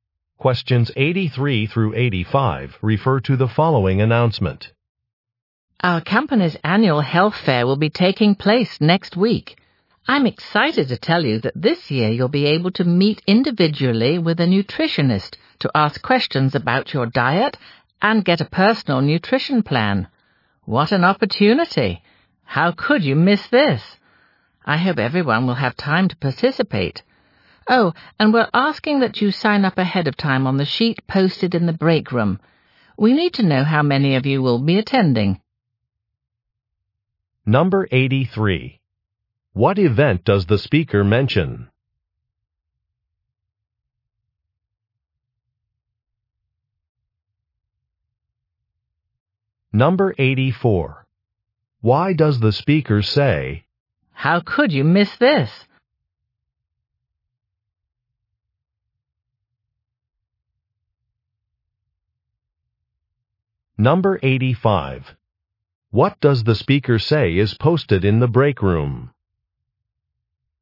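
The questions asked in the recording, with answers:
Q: What event does the speaker mention?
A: The annual company health fair

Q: Why does the speaker say,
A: To encourage everyone to take part

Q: What does the speaker say is posted in the break room?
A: A sign-up sheet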